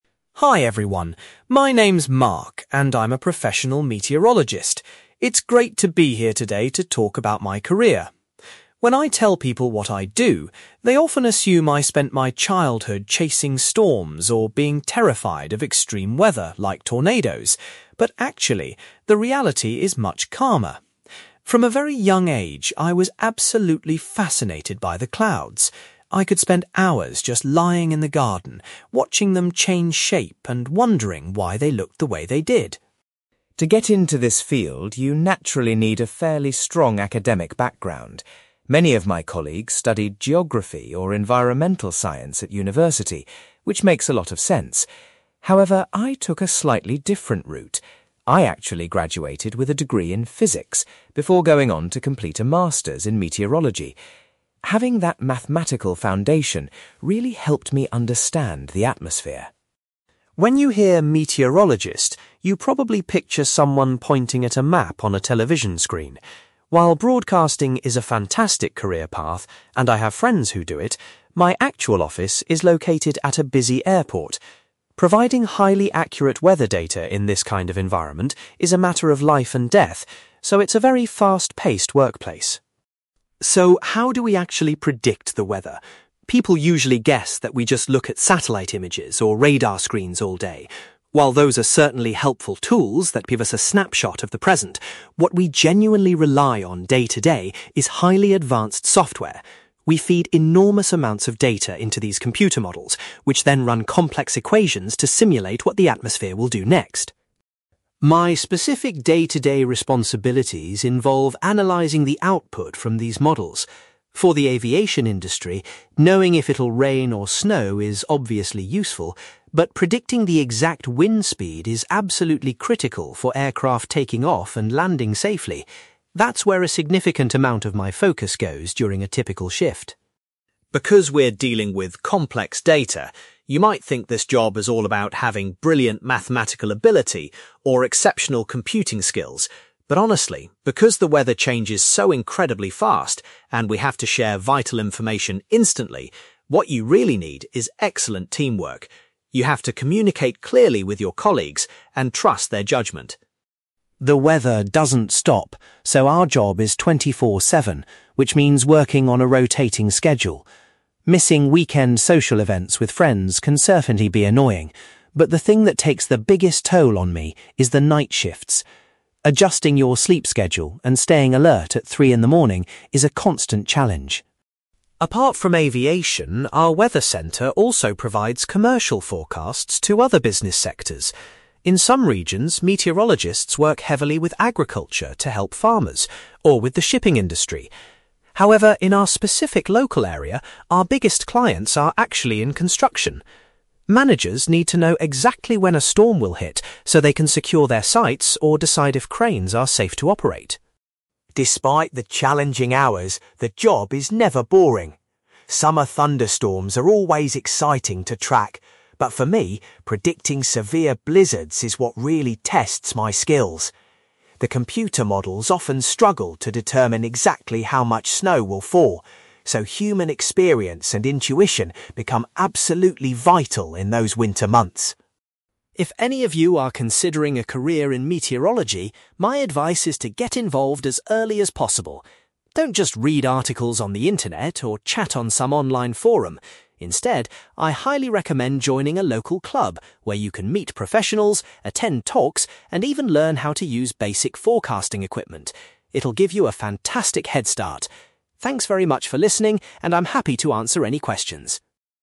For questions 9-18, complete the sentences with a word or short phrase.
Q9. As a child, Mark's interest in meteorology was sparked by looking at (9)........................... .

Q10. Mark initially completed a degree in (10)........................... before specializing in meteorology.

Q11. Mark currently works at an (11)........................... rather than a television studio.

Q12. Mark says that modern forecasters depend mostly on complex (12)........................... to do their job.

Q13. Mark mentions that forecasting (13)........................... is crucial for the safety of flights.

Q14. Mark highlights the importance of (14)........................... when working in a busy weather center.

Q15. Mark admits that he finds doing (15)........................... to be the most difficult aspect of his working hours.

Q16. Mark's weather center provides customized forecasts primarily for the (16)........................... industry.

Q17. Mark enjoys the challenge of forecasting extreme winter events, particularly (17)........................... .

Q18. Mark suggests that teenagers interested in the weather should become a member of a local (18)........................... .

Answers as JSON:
{"9": "clouds", "10": "physics", "11": "airport", "12": "software", "13": "wind speed", "14": "teamwork", "15": "night shifts", "16": "construction", "17": "blizzards", "18": "club"}

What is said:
Mark: Hi everyone, my name is Mark and I'm a professional meteorologist. It's great to be here today to talk about my career. When I tell people what I do, they often assume I spent my childhood chasing storms or being terrified of extreme weather like tornadoes. But actually, the reality is much calmer. From a very young age, I was absolutely fascinated by the clouds. I could spend hours just lying in the garden, watching them change shape and wondering why they looked the way they did.
To get into this field, you naturally need a fairly strong academic background. Many of my colleagues studied geography or environmental science at university, which makes a lot of sense. However, I took a slightly different route. I actually graduated with a degree in physics before going on to complete a master's in meteorology. Having that mathematical foundation really helped me understand the atmosphere.
When you hear 'meteorologist', you probably picture someone pointing at a map on a television screen. While broadcasting is a fantastic career path, and I have friends who do it, my actual office is located at a busy airport. Providing highly accurate weather data in this kind of environment is a matter of life and death, so it's a very fast-paced workplace.
So, how do we actually predict the weather? People usually guess that we just look at satellite images or radar screens all day. While those are certainly helpful tools that give us a snapshot of the present, what we genuinely rely on day-to-day is highly advanced software. We feed enormous amounts of data into these computer models, which then run complex equations to simulate what the atmosphere will do next.
My specific day-to-day responsibilities involve analyzing the output from these models. For the aviation industry, knowing if it'll rain or snow is obviously useful, but predicting the exact wind speed is absolutely critical for aircraft taking off and landing safely. That's where a significant amount of my focus goes during a typical shift.
Because we're dealing with complex data, you might think this job is all about having brilliant mathematical ability or exceptional computing skills. But honestly, because the weather changes so incredibly fast and we have to share vital information instantly, what you really need is excellent teamwork. You have to communicate clearly with your colleagues and trust their judgment.
The weather doesn't stop, so our job is 24/7, which means working on a rotating schedule. Missing weekend social events with friends can certainly be annoying, but the thing that takes the biggest toll on me is the night shifts. Adjusting your sleep schedule and staying alert at three in the morning is a constant challenge.
Apart from aviation, our weather center also provides commercial forecasts to other business sectors. In some regions, meteorologists work heavily with agriculture to help farmers, or with the shipping industry. However, in our specific local area, our biggest clients are actually in construction. Managers need to know exactly when a storm will hit so they can secure their sites or decide if cranes are safe to operate.
Despite the challenging hours, the job is never boring. Summer thunderstorms are always exciting to track, but for me, predicting severe blizzards is what really tests my skills. The computer models often struggle to determine exactly how much snow will fall, so human experience and intuition become absolutely vital in those winter months.
If any of you are considering a career in meteorology, my advice is to get involved as early as possible. Don't just read articles on the internet or chat on some online forum. Instead, I highly recommend joining a local club where you can meet professionals, attend talks, and even learn how to use basic forecasting equipment. It'll give you a fantastic head start. Thanks very much for listening, and I'm happy to answer any questions!

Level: B2